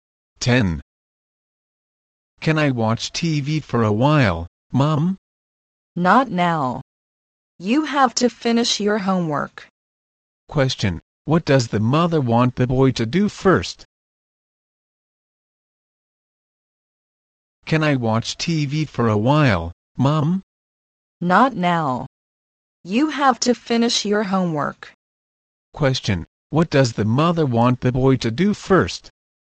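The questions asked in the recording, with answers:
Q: Question: What does the mother want the boy to do first?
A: Finish his homework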